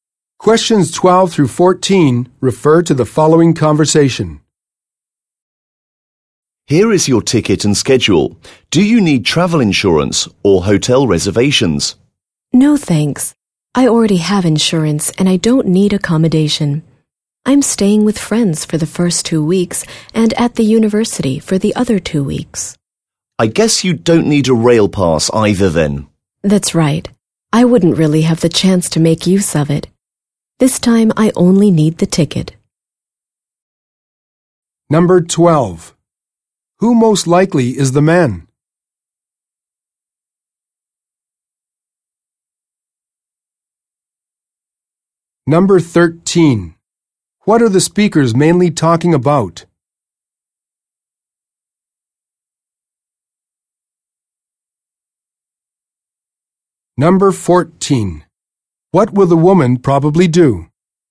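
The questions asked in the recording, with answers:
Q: What are the speakers mainly talking about?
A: Travel arrangements (buying a ticket)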